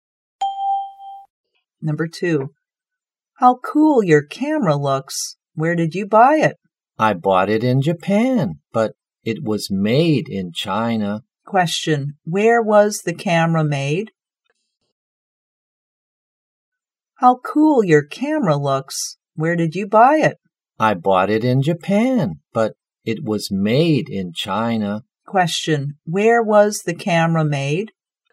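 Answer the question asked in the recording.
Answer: In China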